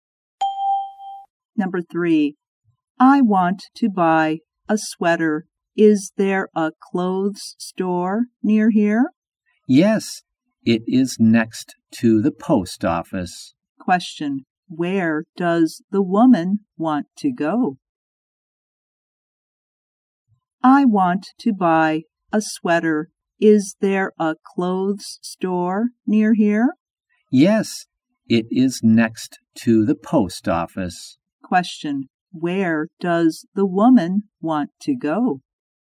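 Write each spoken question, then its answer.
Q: Question, where does the woman want to go?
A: A clothes store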